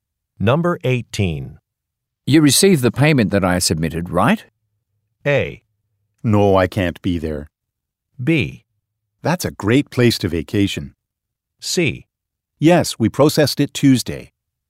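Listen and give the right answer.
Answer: C: Yes, we processed it Tuesday.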